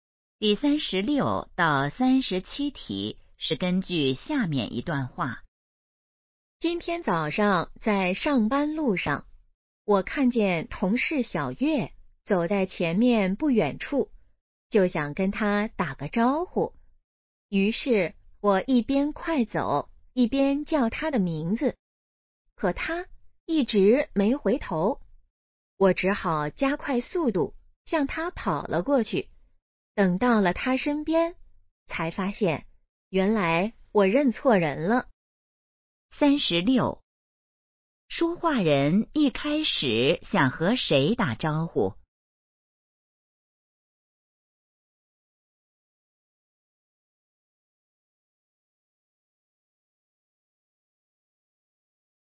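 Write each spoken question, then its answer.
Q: 说话人一开始想和谁打招呼?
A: 同事小月

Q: 说话人怎么了?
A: 认错人了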